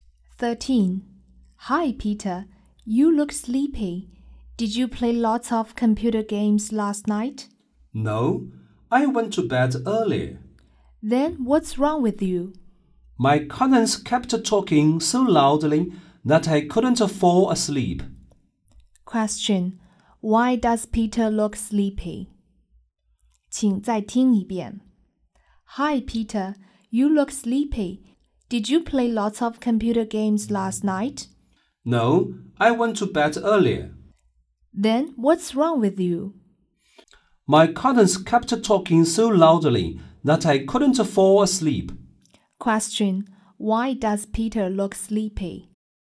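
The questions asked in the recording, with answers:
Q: Question: Why does Peter look sleepy?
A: His cousins kept talking loudly so he couldn't fall asleep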